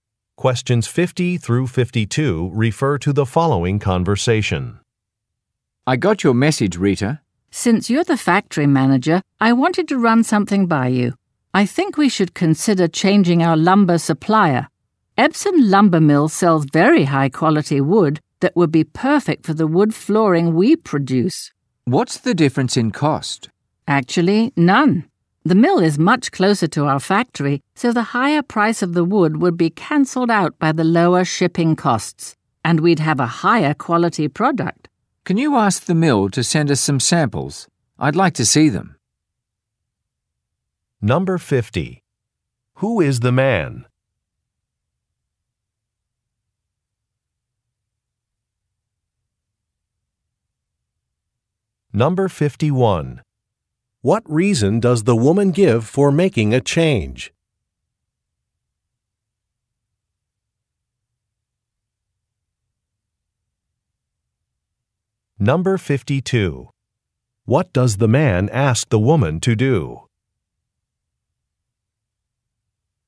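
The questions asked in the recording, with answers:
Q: Who is the man?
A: The factory manager

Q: What reason does the woman give for making a change?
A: The new mill sells higher-quality wood at no extra overall cost

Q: What does the man ask the woman to do?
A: Ask the mill to send some samples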